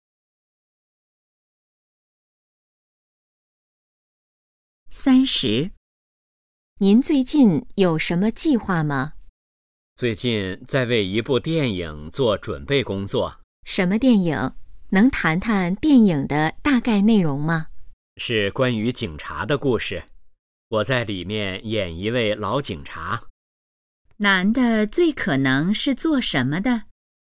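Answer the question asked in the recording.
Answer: 演员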